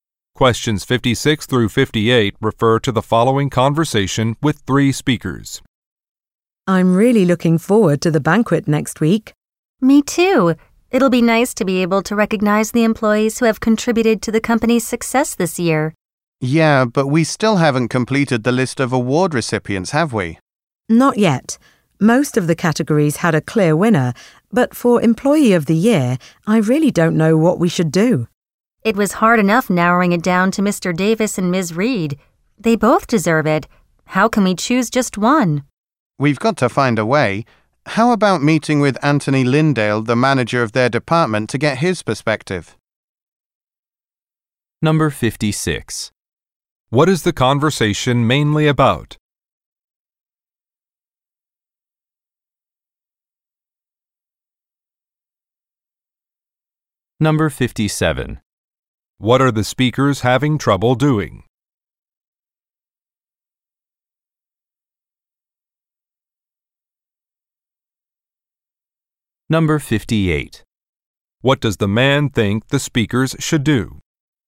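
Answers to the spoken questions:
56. An awards banquet
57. Choosing the Employee of the Year
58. Meet with the department manager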